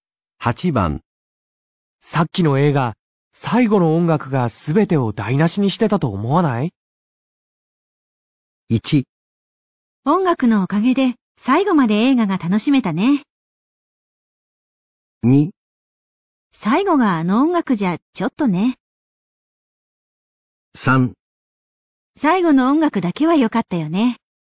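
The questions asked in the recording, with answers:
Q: さっきの映画、最後の音楽が全てを台無しにしてたと思わない?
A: 2: 最後があの音楽じゃちょっとね。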